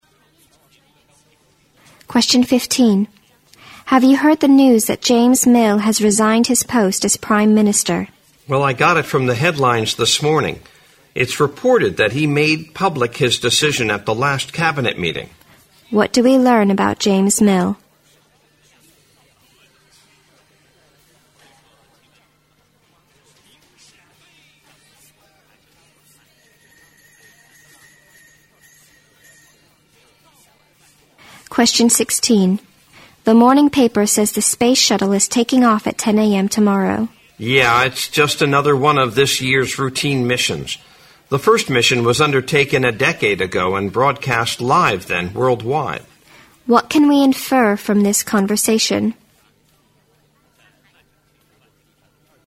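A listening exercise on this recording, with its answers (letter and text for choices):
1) What do we learn about James Mill?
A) He has left his position in the government.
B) He has already reached the retirement age.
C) He made a stupid decision at the cabinet meeting.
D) He has been successfully elected Prime Minister.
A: A) He has left his position in the government.

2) What can we infer from the conversation?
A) This year's shuttle mission is a big step in space exploration.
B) The man is well informed about the space shuttle missions.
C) The shuttle flight will be broadcast live worldwide.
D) The man is excited at the news of the shuttle flight.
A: B) The man is well informed about the space shuttle missions.

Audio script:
W: Have you heard the news that James Mill has resigned his post as Prime Minster?
M: Well, I got it from the headlines this morning. It's reported that he made pubic his decision at the last cabinet meeting。
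Q: What do we learn about James Mill?
W: The morning paper says the space shuttle is taking off at 10 am tomorrow。
M: Yeah, it's just another one of this year's routine missions. The first mission was undertaken a decade ago and broadcast live then worldwide。
Q: What can we infer from the conversation?

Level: 六级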